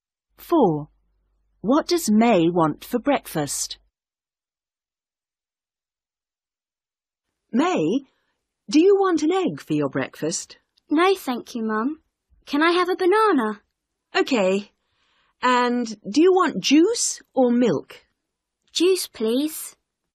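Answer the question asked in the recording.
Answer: A banana and juice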